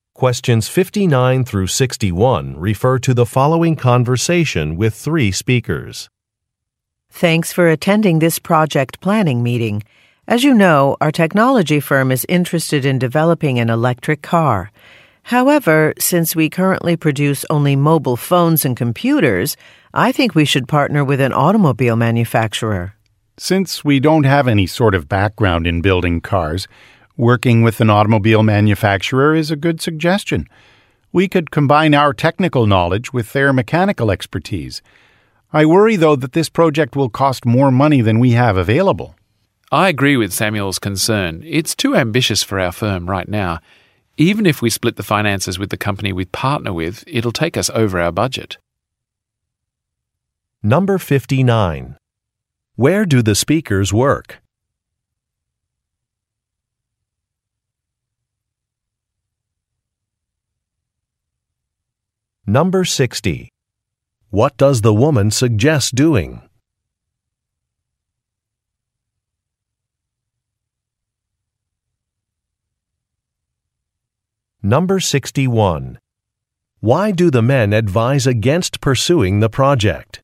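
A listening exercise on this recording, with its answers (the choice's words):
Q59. Where do the speakers work?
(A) At a toy manufacturer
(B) At a financial institution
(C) At a car repair shop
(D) At a technology company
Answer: At a technology company

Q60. What does the woman suggest doing?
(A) Collaborating with another company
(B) Investing in better machinery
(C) Arranging some job interviews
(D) Evaluating consumer interest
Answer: Collaborating with another company

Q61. Why do the men advise against pursuing the project?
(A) It will take too long to complete.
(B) It will cost too much money.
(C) A factory cannot meet production demands.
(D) A similar product is already available.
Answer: It will cost too much money.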